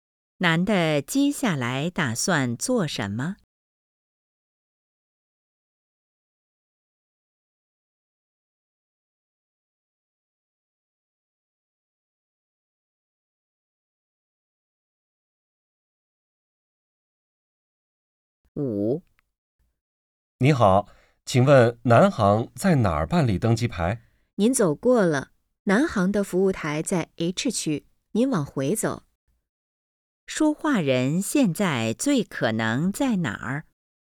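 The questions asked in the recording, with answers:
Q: 说话人现在最可能在哪儿?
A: 机场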